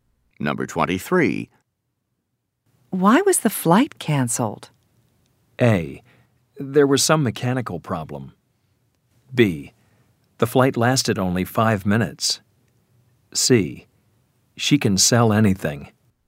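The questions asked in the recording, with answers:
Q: Why was the flight canceled?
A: A: There was some mechanical problem.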